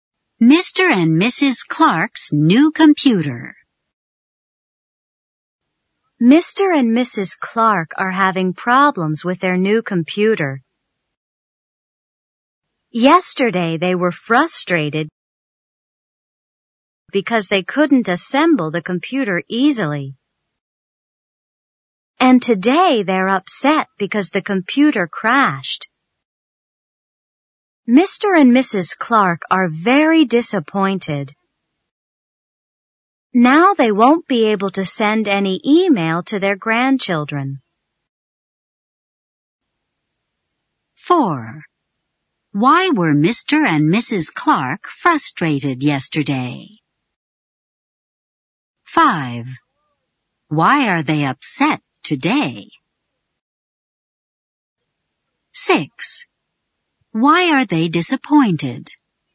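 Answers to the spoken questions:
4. They couldn't assemble the computer easily.
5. The computer crashed.
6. They won't be able to send any email to their grandchildren.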